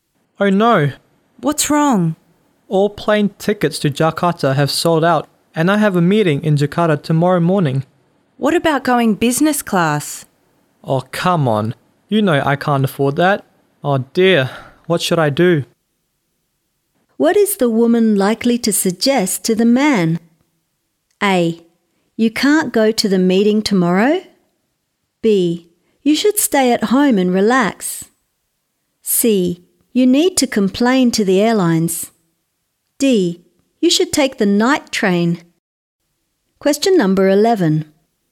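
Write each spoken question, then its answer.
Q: What is the woman likely to suggest to the man?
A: D: You should take the night train.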